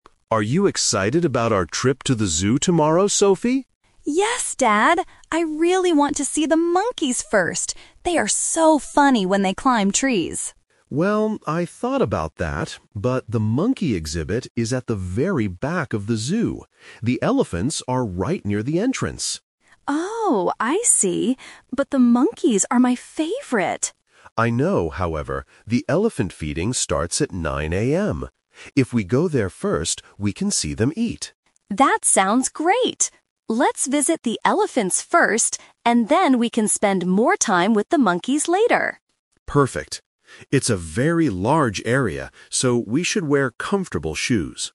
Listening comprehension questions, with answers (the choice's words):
Listen to the conversation between a father and his daughter and choose the correct answer (A, B, or C).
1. Which animal does Sophie want to see at the beginning of the conversation?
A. The elephants.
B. The monkeys.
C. The lions.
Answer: The monkeys.

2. Where is the monkey exhibit located?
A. Near the entrance of the zoo.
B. Outside the zoo area.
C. At the back of the zoo.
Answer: At the back of the zoo.

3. What is the final decision? Which animal will they see first?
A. The monkeys, because they are Sophie's favorite.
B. The elephants, because of the feeding time.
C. Both animals at the same time.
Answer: The elephants, because of the feeding time.

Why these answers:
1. Sophie explicitly says, "I really want to see the monkeys first." Option (A) is the trap because that is what they decide later, not what she wanted at the beginning.
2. The father mentions that "the monkey exhibit is at the very back of the zoo." Option (A) is the trap; the father says the elephants are near the entrance, not the monkeys.
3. Although Sophie loves monkeys, she agrees with her dad's suggestion: "Let's visit the elephants first" to catch the 9:00 AM feeding. This is the "Result".

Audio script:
Dad: Are you excited about our trip to the zoo tomorrow, Sophie?
Sophie: Yes, Dad! I really want to see the monkeys first. They are so funny when they climb trees.
Dad: Well, I thought about that, but the monkey exhibit is at the very back of the zoo. The elephants are right near the entrance.
Sophie: Oh, I see. But the monkeys are my favorite!
Dad: I know, however, the elephant feeding starts at 9:00 AM. If we go there first, we can see them eat.
Sophie: That sounds great! Let's visit the elephants first, and then we can spend more time with the monkeys later.
Dad: Perfect. It's a very large area, so we should wear comfortable shoes.